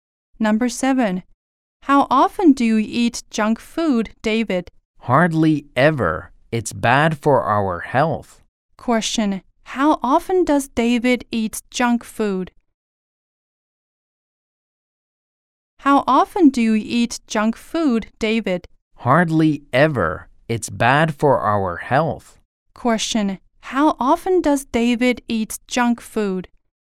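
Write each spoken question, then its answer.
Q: How often does David eat junk food?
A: Hardly ever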